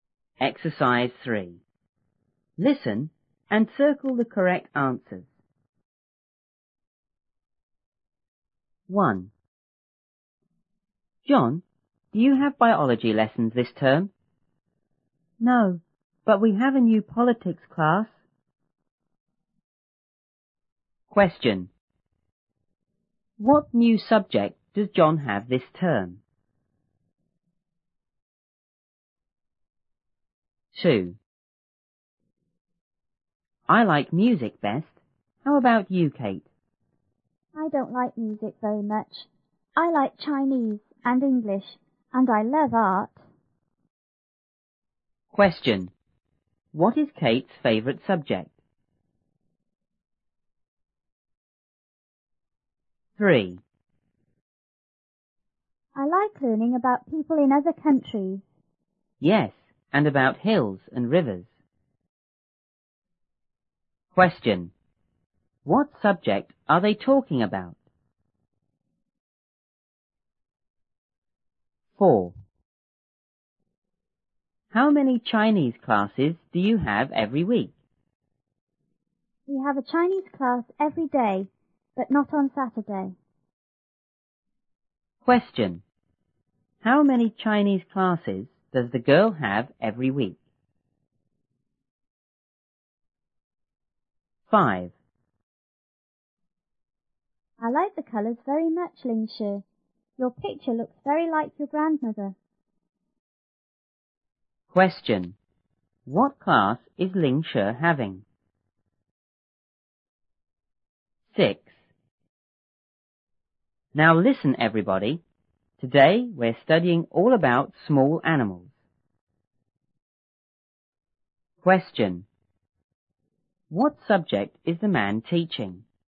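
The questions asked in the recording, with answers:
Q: What new subject does John have this term?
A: Politics

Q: What is Kate's favourite subject?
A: Art

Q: What subject are they talking about?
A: Geography

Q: What class is Ling Shi having?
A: Art

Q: What subject is the man teaching?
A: Biology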